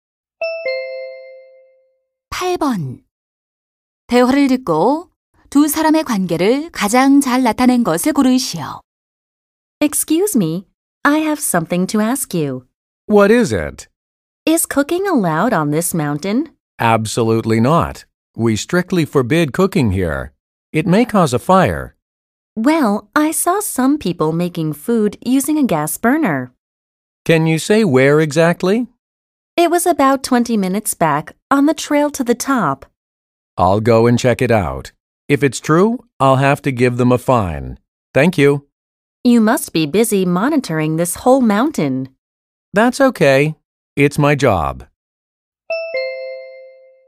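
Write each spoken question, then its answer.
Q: 대화를 듣고 두 사람의 관계를 가장 잘 나타낸 것을 고르시오.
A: 등산객 - 산림 관리원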